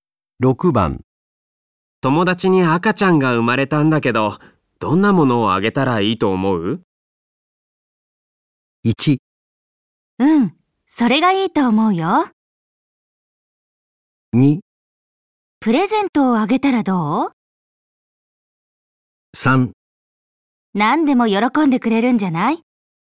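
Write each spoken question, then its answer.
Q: 友達に赤ちゃんが生まれたんだけど、どんなものをあげたらいいと思う?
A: 3: 何でも喜んでくれるんじゃない?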